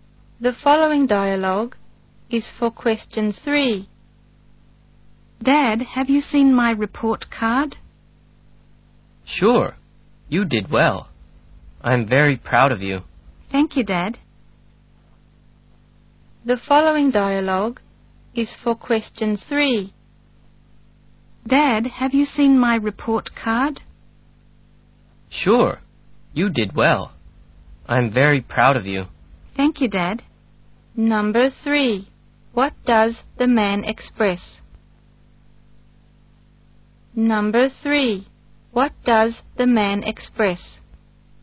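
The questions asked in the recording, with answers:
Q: What does the man express?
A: Pride in his child's report card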